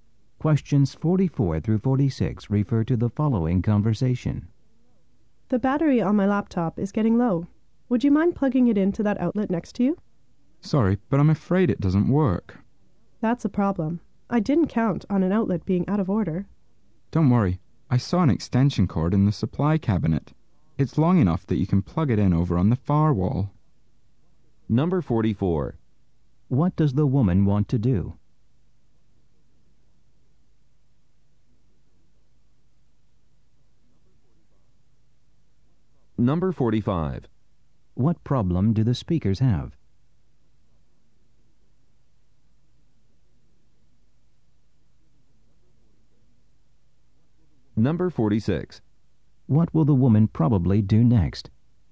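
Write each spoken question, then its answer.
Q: What problem do the speakers have?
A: The outlet doesn't work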